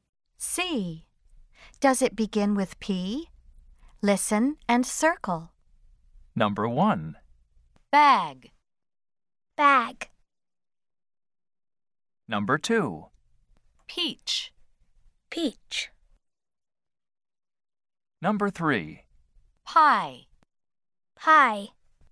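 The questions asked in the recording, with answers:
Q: Does it begin with P?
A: No (bag)

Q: Does it begin with P?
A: Yes (peach)

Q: Does it begin with P?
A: Yes (pie)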